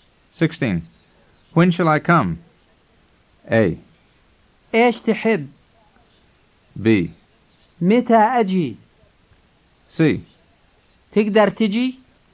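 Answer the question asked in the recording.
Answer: B: متى أجي؟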